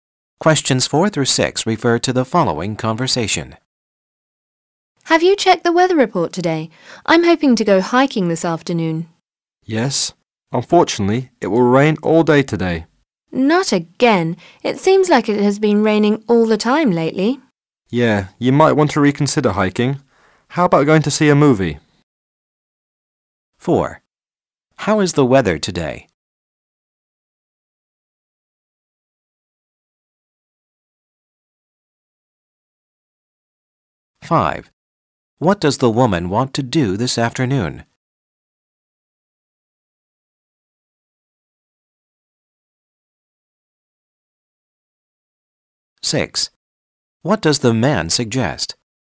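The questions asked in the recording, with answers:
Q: How is the weather today?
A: It will rain all day

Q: What does the woman want to do this afternoon?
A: Go hiking

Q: What does the man suggest?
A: Going to see a movie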